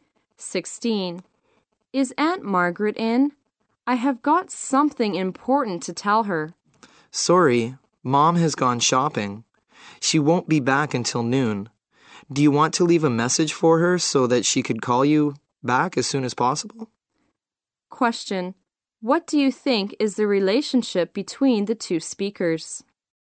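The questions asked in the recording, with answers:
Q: What do you think is the relationship between the two speakers?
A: Niece/nephew and aunt.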